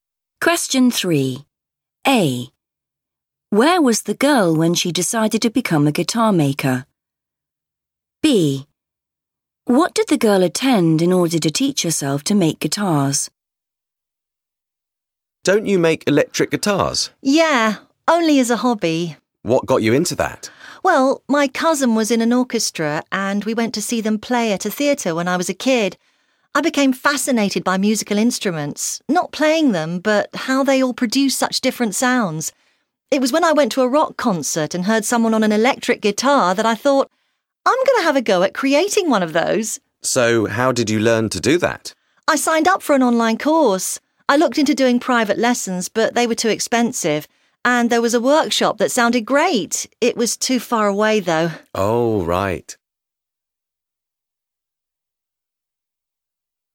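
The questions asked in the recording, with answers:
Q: Where was the girl when she decided to become a guitar maker?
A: at a rock concert

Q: What did the girl attend in order to teach herself to make guitars?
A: an online course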